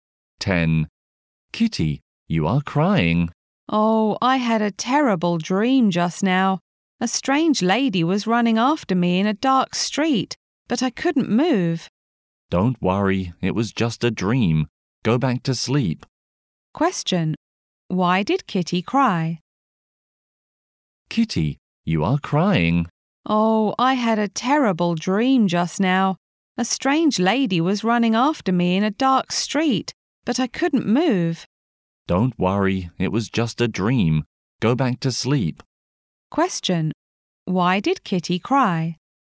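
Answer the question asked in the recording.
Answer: She had a terrible dream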